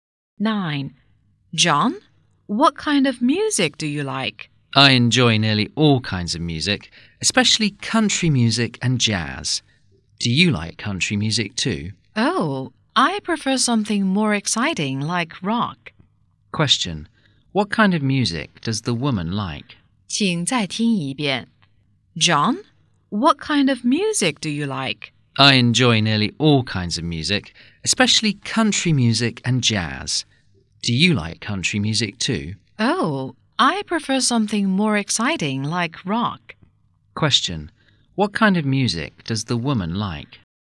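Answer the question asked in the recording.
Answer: Rock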